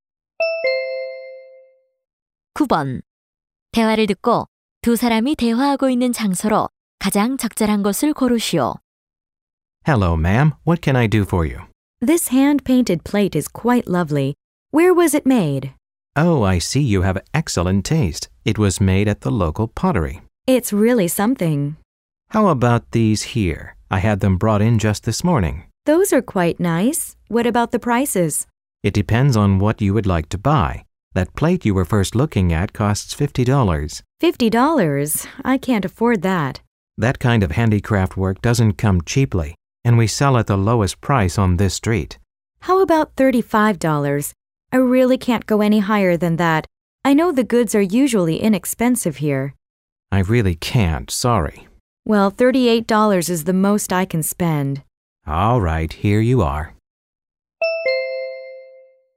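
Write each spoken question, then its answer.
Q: 대화를 듣고 두 사람이 대화하고 있는 장소로 가장 적절한 것을 고르시오.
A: 수공예품 가게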